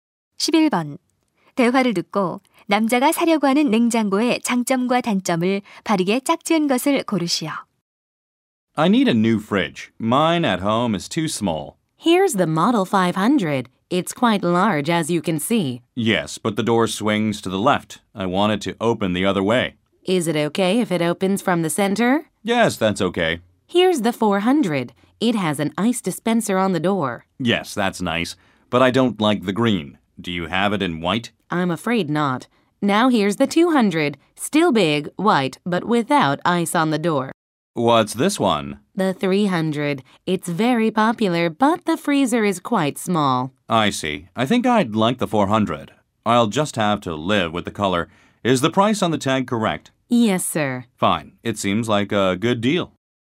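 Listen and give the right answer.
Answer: 장점: 문에 얼음 디스펜서가 있음 / 단점: 색상(초록색)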